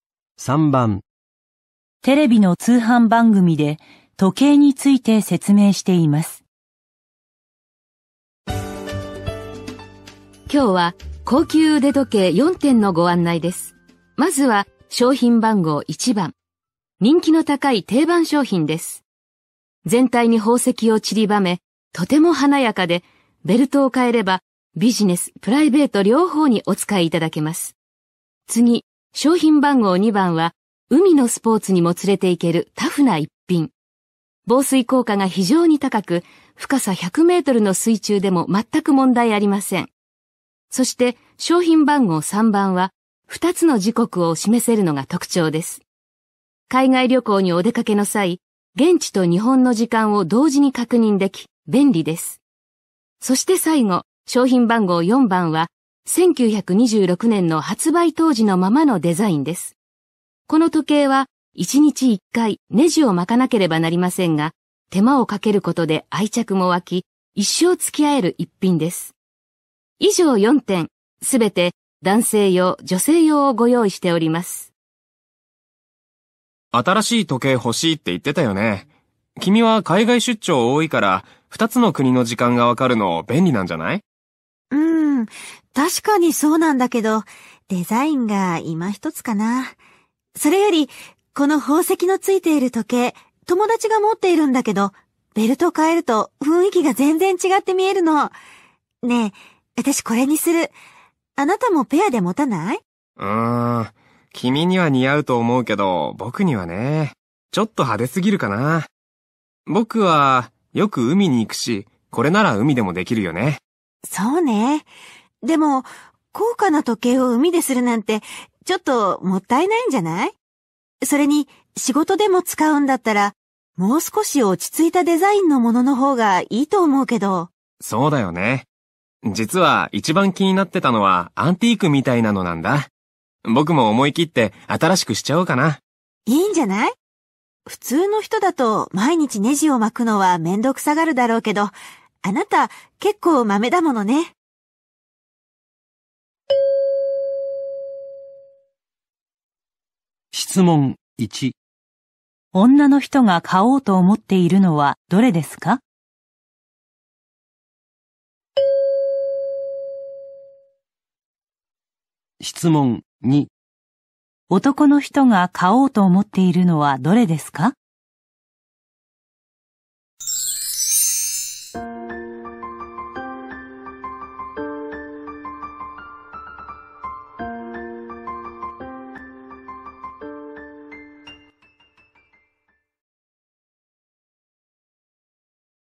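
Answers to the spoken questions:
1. 1番の宝石を散りばめた時計
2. 4番の発売当時のデザインの時計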